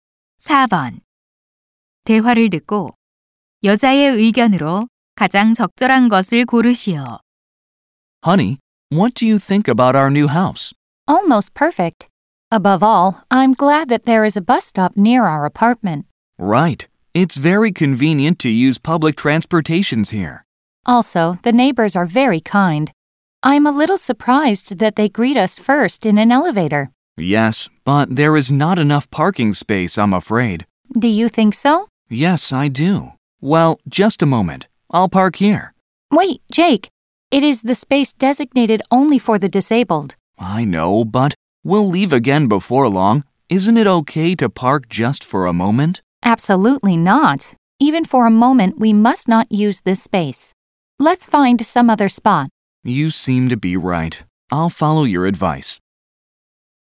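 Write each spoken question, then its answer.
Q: 대화를 듣고 여자의 의견으로 가장 적절한 것을 고르시오.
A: 잠시라도 장애인 전용 주차 구역에 주차하면 안 된다.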